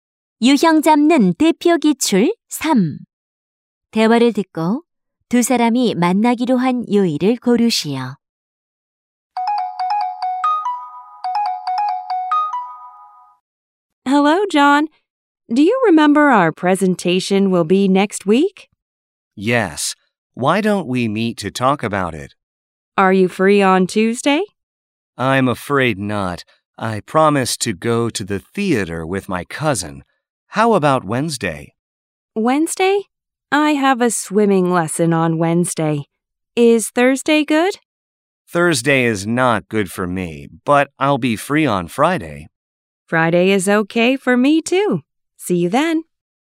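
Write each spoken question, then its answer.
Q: 대화를 듣고 두 사람이 만나기로 한 요일을 고르시오.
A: 금요일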